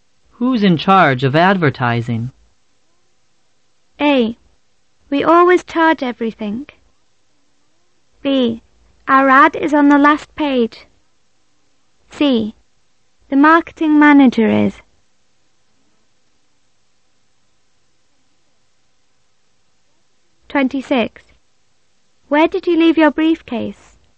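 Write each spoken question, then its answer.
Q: Who's in charge of advertising?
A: C: The marketing manager is.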